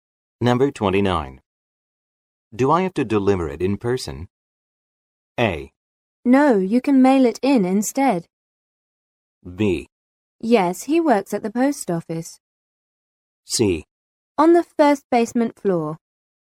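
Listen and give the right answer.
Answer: A: No, you can mail it in instead.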